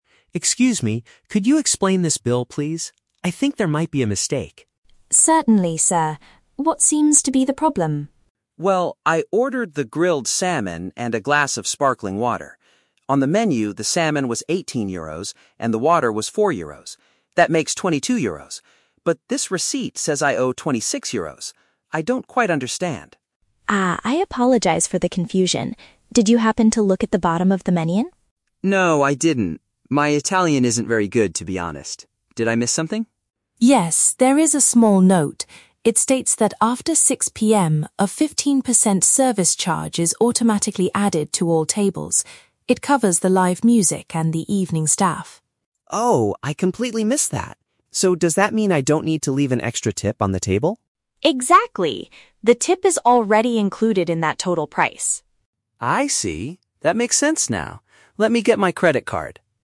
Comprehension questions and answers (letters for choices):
Listen to the conversation between a tourist and a waiter. Choose the correct answer (A, B, or C) for each question.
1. Why does the tourist call the waiter over to his table?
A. To complain that his grilled salmon was overcooked.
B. To question why his meal cost more than he calculated.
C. To request an English translation of the restaurant's menu.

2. What caused the misunderstanding about the price?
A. The tourist failed to read a specific detail about extra fees.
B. The waiter made a mathematical error when adding up the items.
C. The man ordered more expensive drinks than he remembered.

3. What does the additional fee pay for?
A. A special tip given directly to the kitchen chef.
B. The musicians and the restaurant employees.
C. The cost of using a foreign credit card to pay.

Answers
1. B
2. A
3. B

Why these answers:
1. The tourist says the menu prices "make 22 euros," but the receipt says "26 euros." He is asking why it costs more than his calculation. Why the trap is wrong: Option (A) is a trap. The audio mentions "grilled salmon," but he doesn't complain about how it was cooked. Option (C) is a trap because he admits his "Italian isn't very good," but he doesn't ask for an English menu.
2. The waiter asks if he looked at the "bottom of the menu" where a note explains the "15% service charge," and the tourist admits he "completely missed that." Why the trap is wrong: Option (B) is the main trap. The tourist initially says, "I think there might be a mistake," which makes listeners think there is a math error, but the math is actually correct with the added fee. Option (C) is not mentioned.
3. The waiter explains that the charge covers the "live music and the evening staff." "Musicians" means live music, and "employees" means staff. Why the trap is wrong: Option (A) is the trap. The tourist asks about a "tip," and the waiter says it is included, but it is for the evening staff in general, not specifically the "kitchen chef." Option (C) is a trap because the audio mentions "credit card," but it is the tourist's payment method, not the reason for the extra fee.

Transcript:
Tourist: Excuse me, could you explain this bill, please? I think there might be a mistake.
Waiter: Certainly, sir. What seems to be the problem?
Tourist: Well, I ordered the grilled salmon and a glass of sparkling water. On the menu, the salmon was 18 euros and the water was 4 euros. That makes 22 euros. But this receipt says I owe 26 euros. I don't quite understand.
Waiter: Ah, I apologize for the confusion. Did you happen to look at the bottom of the menu?
Tourist: No, I didn't. My Italian isn't very good, to be honest. Did I miss something?
Waiter: Yes, there is a small note. It states that after 6:00 PM, a 15% service charge is automatically added to all tables. It covers the live music and the evening staff.
Tourist: Oh! I completely missed that. So, does that mean I don't need to leave an extra tip on the table?
Waiter: Exactly. The tip is already included in that total price.